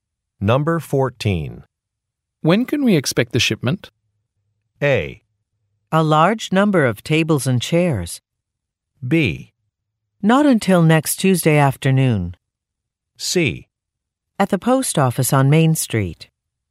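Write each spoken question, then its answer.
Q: When can we expect the shipment?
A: B: Not until next Tuesday afternoon.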